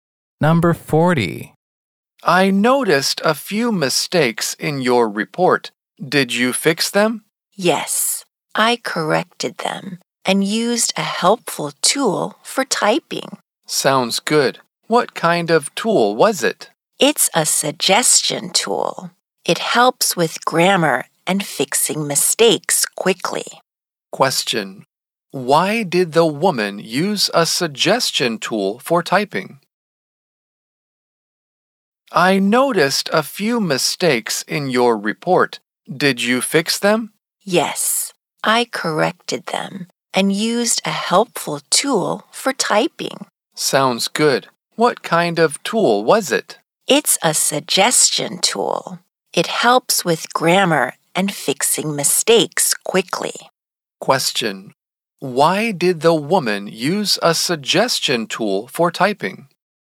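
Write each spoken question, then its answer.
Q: Why did the woman use a suggestion tool for typing?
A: It helps with grammar and fixing mistakes quickly.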